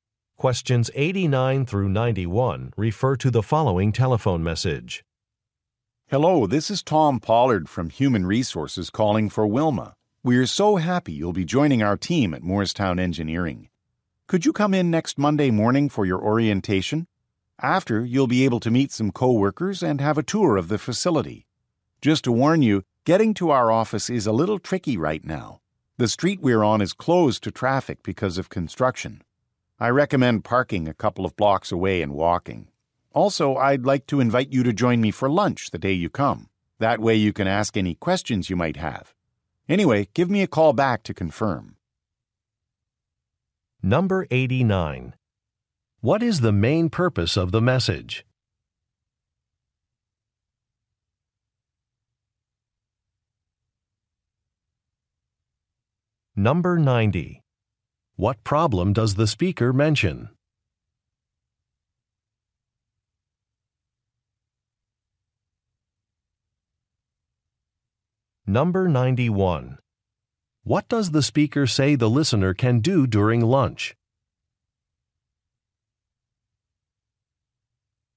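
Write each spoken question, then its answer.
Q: What is the main purpose of the message?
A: To schedule a new employee's orientation

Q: What problem does the speaker mention?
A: The street is closed for construction

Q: What does the speaker say the listener can do during lunch?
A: Ask questions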